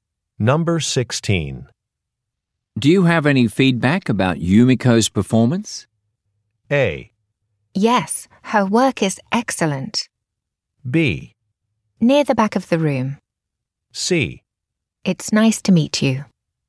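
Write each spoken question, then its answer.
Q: Do you have any feedback about Yumiko's performance?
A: A: Yes, her work is excellent.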